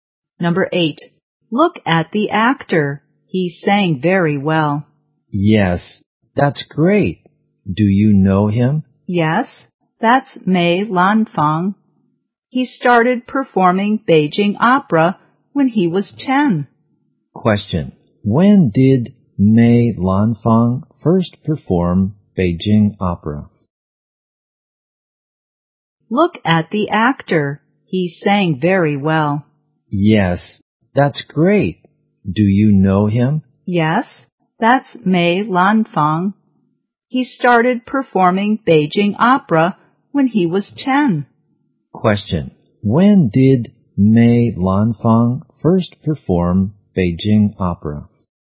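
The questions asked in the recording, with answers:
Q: When did Mei Lanfang first perform Beijing opera?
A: When he was 10.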